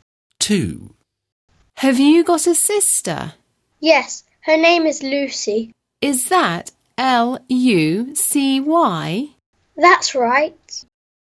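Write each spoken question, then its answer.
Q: Have you got a sister?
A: Lucy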